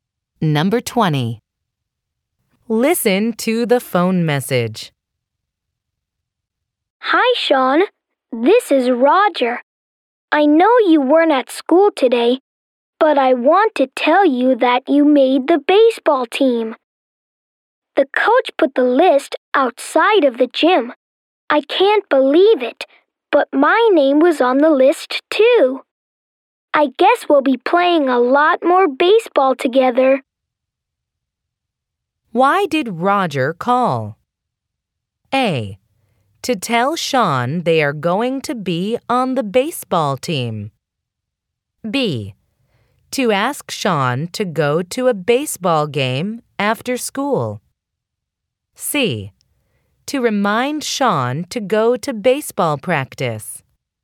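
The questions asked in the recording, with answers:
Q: Why did Roger call?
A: A: To tell Sean they are going to be on the baseball team.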